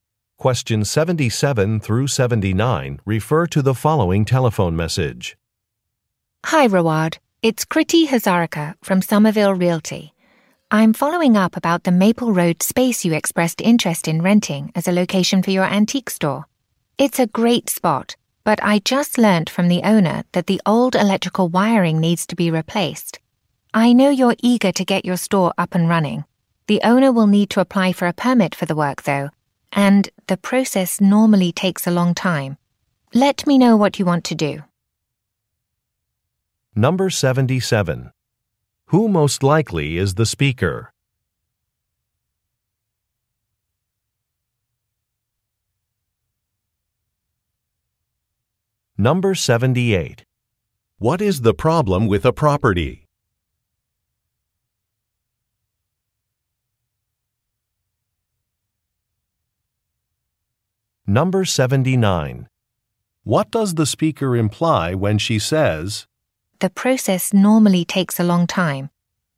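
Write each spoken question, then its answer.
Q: Who most likely is the speaker?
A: A real estate agent

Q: What is the problem with a property?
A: The electrical wiring needs replacing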